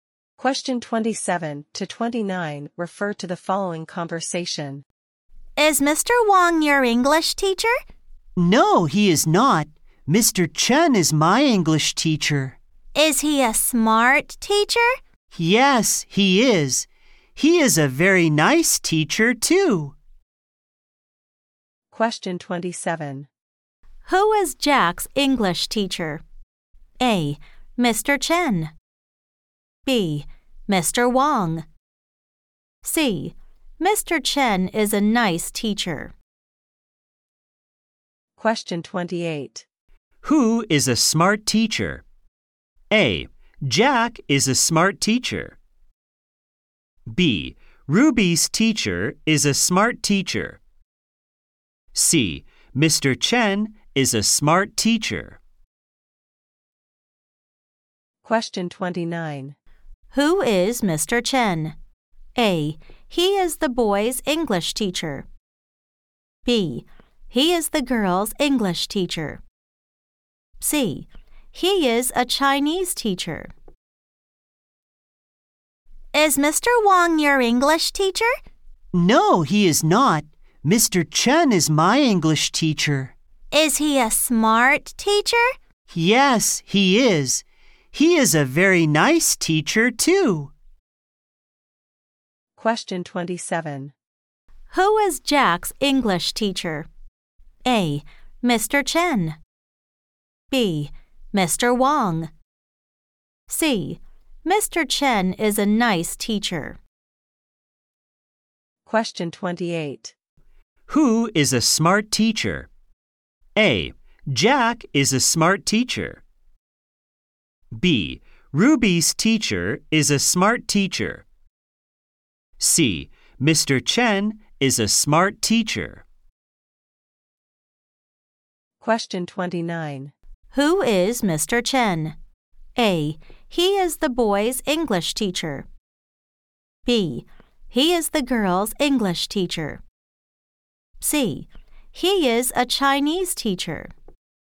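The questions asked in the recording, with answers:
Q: Who is Jack's English teacher?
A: A: Mr. Chen.

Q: Who is a smart teacher?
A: C: Mr. Chen is a smart teacher.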